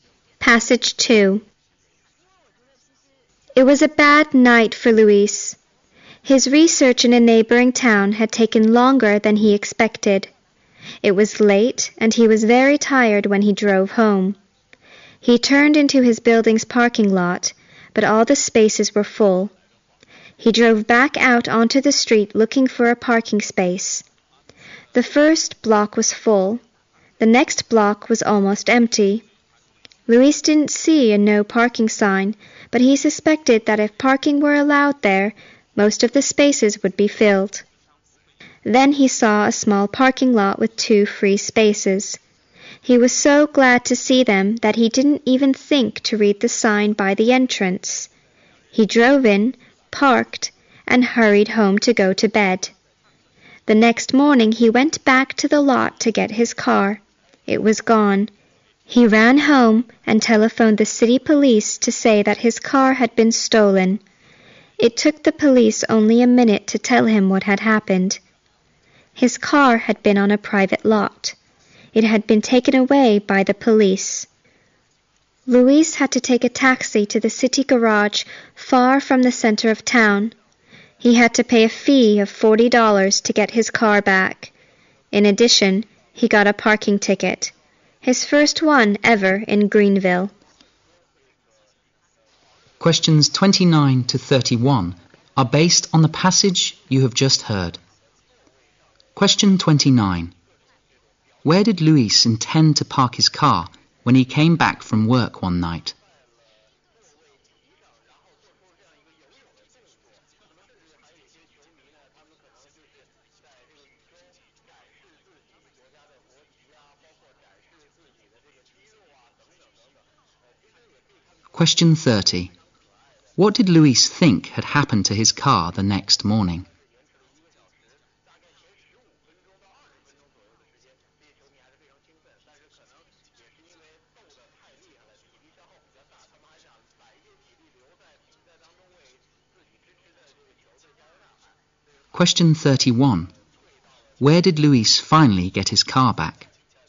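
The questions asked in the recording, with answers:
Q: Where did Luis intend to park his car when he came back from work one night?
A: In his building's parking lot

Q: What did Luis think had happened to his car the next morning?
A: It had been stolen

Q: Where did Luis finally get his car back?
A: At the city garage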